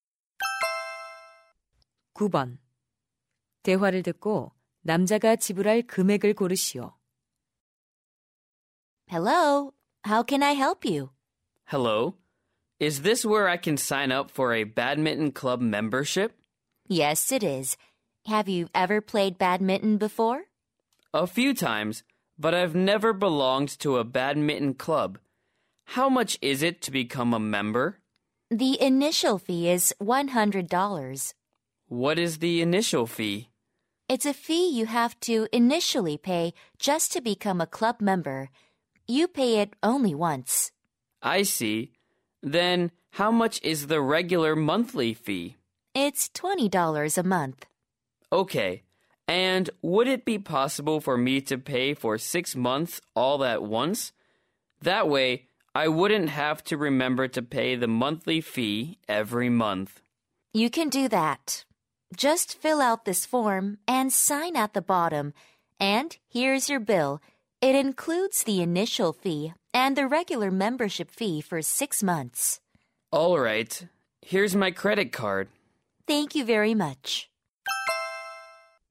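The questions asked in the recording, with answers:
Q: 대화를 듣고 남자가 지불할 금액을 고르시오.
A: $220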